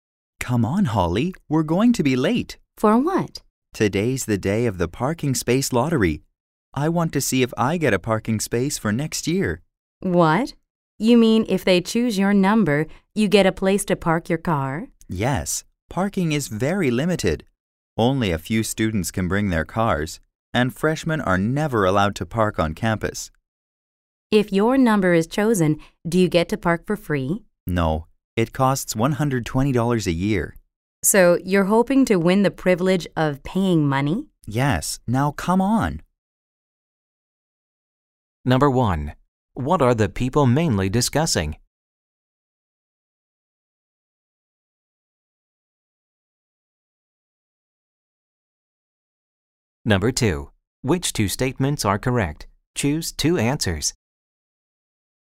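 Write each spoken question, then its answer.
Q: What are the people mainly discussing?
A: The parking space lottery on campus

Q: What is the main thing that the man wants?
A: A parking space on campus for next year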